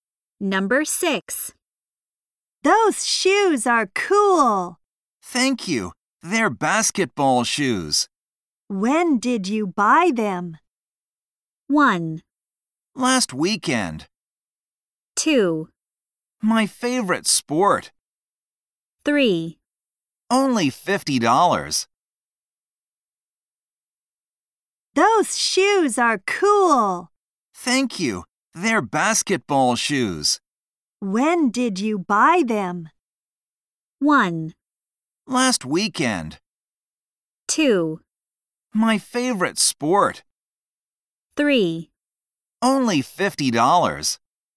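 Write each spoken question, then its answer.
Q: When did you buy them?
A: 1: Last weekend.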